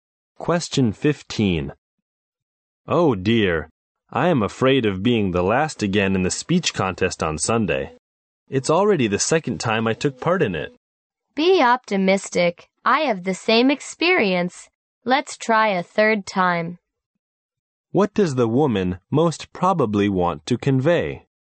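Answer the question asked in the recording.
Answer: He should stay optimistic and keep trying.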